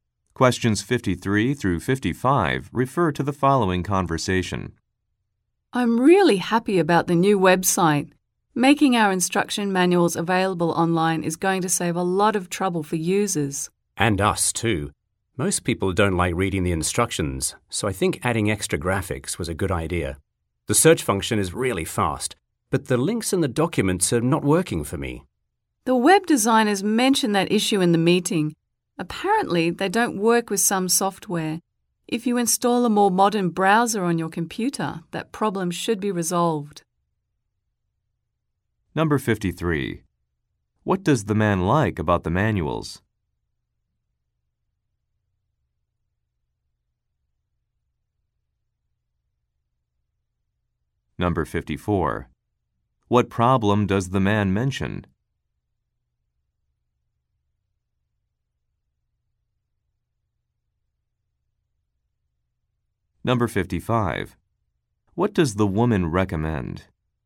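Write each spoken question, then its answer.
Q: What does the woman recommend?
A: Installing a more modern browser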